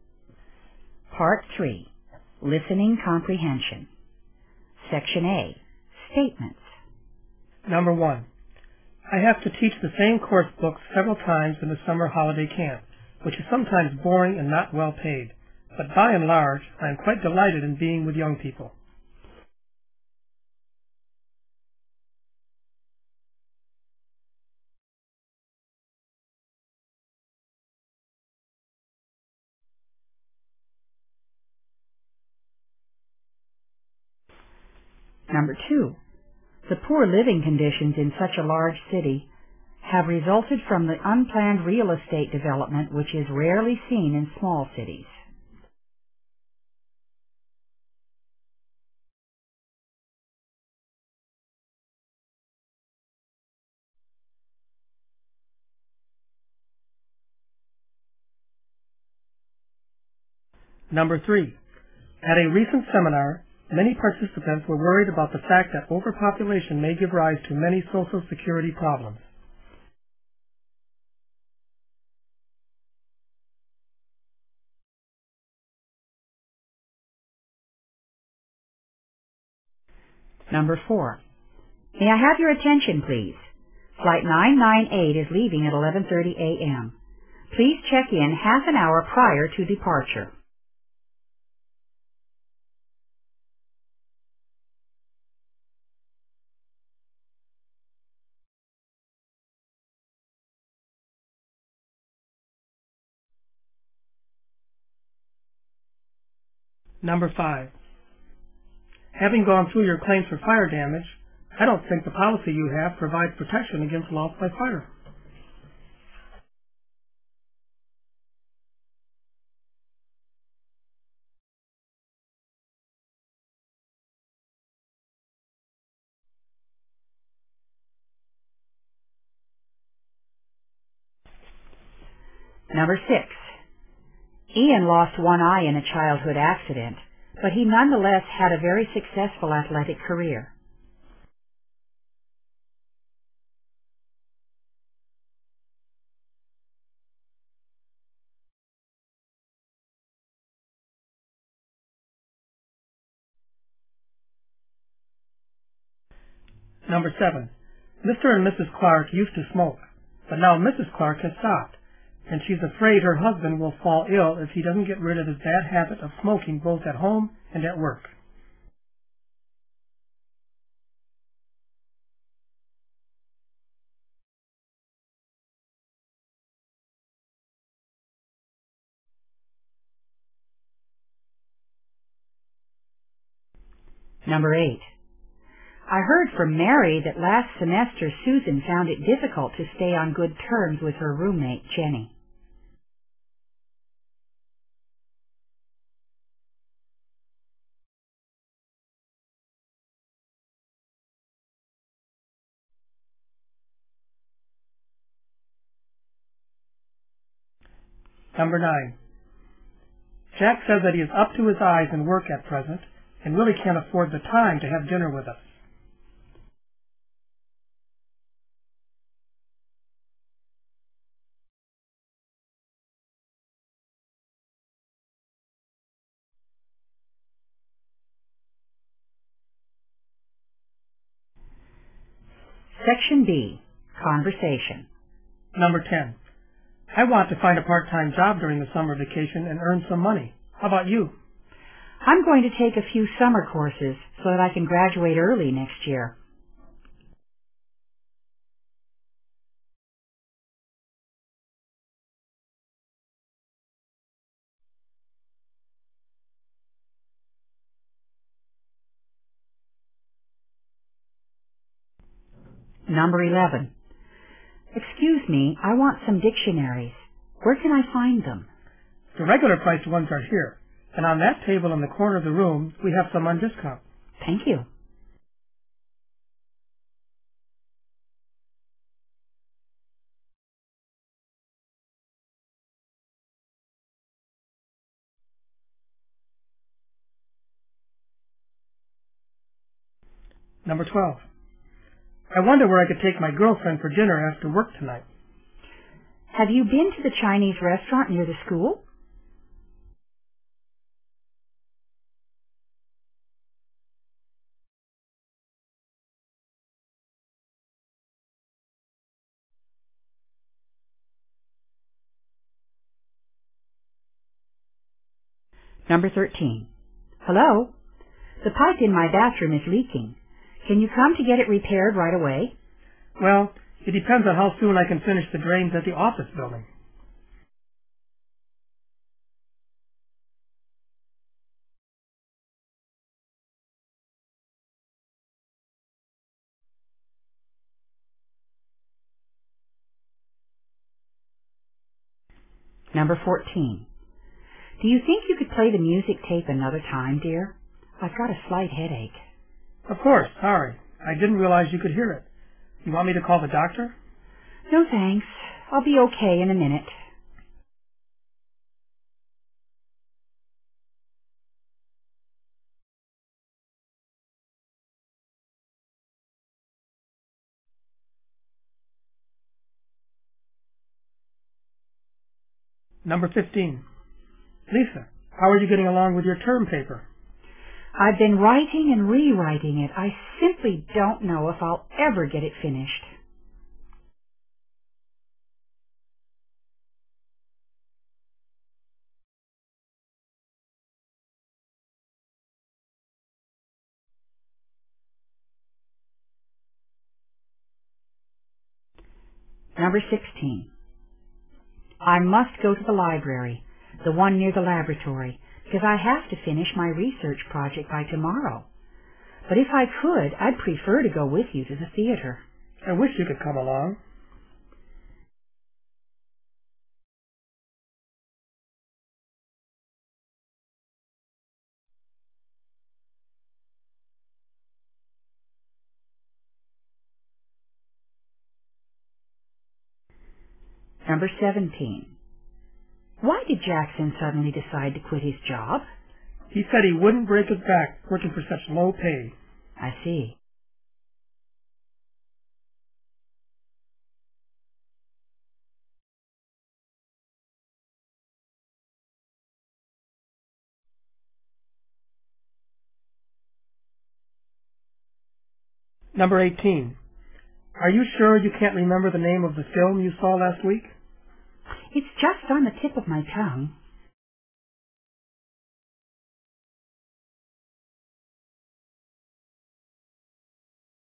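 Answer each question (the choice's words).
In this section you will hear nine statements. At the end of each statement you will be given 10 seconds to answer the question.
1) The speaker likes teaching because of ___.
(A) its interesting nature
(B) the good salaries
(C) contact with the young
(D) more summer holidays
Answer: contact with the young

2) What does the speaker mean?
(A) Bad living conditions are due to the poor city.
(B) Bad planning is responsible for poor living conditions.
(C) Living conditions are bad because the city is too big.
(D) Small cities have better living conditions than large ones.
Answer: Bad planning is responsible for poor living conditions.

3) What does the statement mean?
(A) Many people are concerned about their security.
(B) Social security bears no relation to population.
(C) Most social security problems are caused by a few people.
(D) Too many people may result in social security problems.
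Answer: Too many people may result in social security problems.

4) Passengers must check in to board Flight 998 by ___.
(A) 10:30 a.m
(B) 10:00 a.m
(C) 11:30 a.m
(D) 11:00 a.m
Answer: 11:00 a.m

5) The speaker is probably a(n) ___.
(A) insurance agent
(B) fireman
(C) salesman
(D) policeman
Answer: insurance agent

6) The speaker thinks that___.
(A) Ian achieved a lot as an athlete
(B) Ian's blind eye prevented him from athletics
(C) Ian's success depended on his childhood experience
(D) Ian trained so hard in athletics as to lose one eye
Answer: Ian achieved a lot as an athlete

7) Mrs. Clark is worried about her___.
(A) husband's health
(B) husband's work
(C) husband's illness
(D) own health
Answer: husband's health

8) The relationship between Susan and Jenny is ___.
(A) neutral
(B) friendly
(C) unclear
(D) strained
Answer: strained

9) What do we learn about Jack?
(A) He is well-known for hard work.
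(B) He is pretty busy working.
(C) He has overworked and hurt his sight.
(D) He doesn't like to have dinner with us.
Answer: He is pretty busy working.

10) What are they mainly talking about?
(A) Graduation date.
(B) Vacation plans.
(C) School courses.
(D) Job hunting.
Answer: Vacation plans.

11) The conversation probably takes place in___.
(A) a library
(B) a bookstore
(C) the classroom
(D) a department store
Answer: a bookstore

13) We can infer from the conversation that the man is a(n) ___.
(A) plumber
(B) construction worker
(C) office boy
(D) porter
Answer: plumber

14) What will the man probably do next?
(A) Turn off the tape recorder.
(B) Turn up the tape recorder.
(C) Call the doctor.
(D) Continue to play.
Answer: Turn off the tape recorder.

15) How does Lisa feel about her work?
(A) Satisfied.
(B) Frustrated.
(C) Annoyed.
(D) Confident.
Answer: Frustrated.

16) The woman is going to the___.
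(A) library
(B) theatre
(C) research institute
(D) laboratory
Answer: library

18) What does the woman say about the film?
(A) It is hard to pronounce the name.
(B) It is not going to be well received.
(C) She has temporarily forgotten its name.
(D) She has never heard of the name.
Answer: She has temporarily forgotten its name.

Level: 英语专业四级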